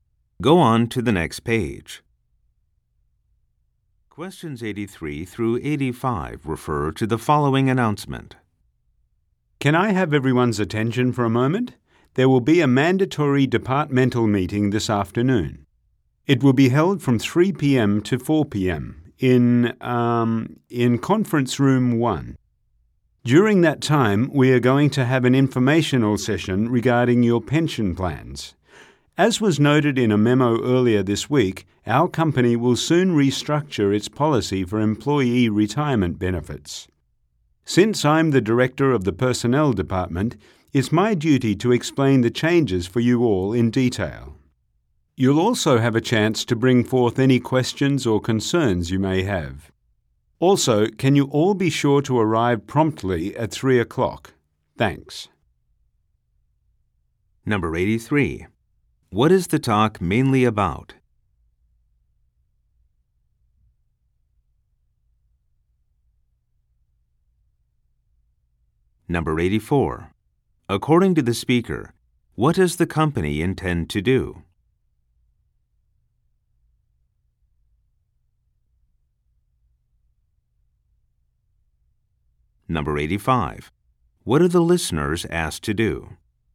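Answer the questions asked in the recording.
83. A required meeting about pension plans
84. Change its retirement benefits policy
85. Arrive on time at 3 o'clock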